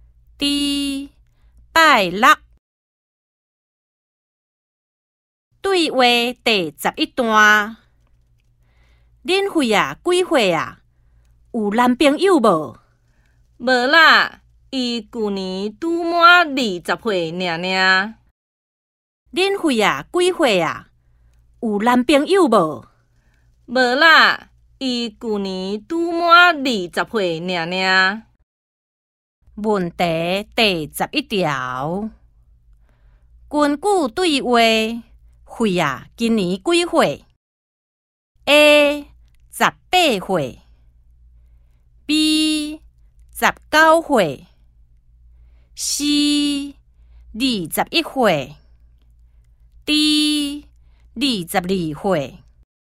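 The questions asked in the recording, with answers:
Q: 根据对话,慧啊,今年几岁 ?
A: C: 二十一岁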